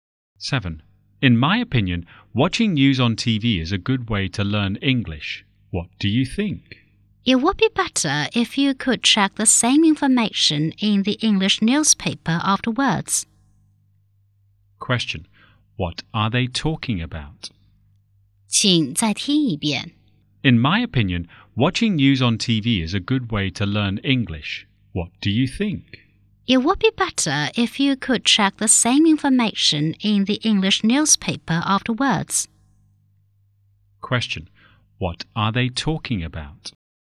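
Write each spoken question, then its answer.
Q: What are they talking about?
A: A good way to learn English.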